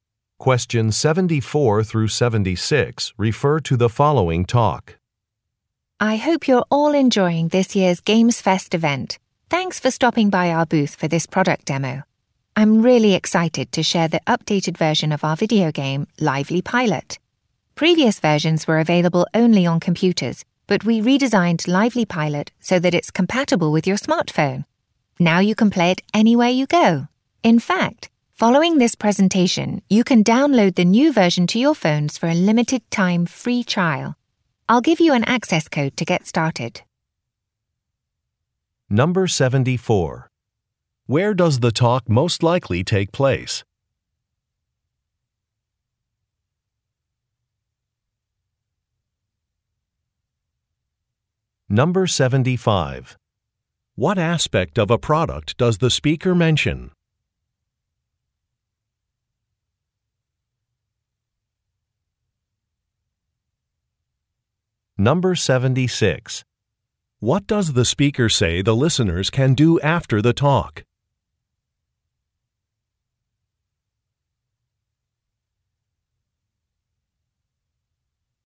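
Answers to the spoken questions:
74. At a gaming convention (GamesFest event booth)
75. It is now compatible with smartphones
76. Download a free trial of the game to their phones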